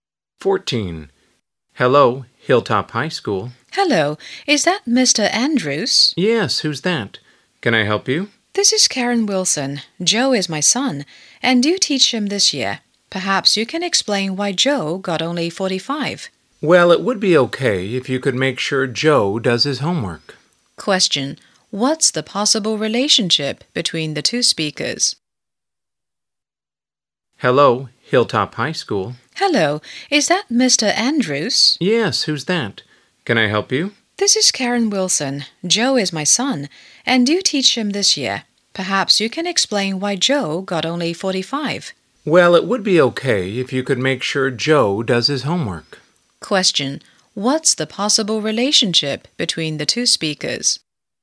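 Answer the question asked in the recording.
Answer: Teacher and parent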